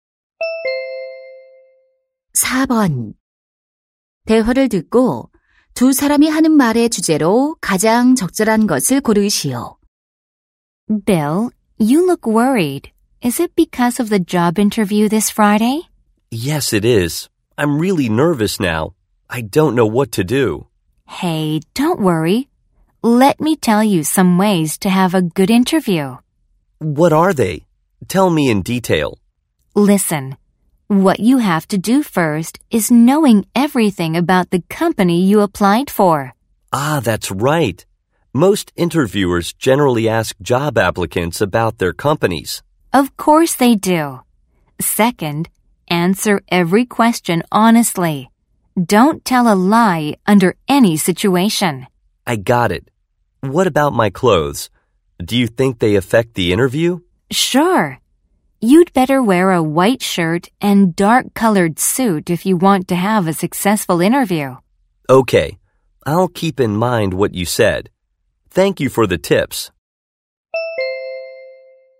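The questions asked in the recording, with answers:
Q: 대화를 듣고 두 사람이 하는 말의 주제로 가장 적절한 것을 고르시오.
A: 면접을 잘 보는 방법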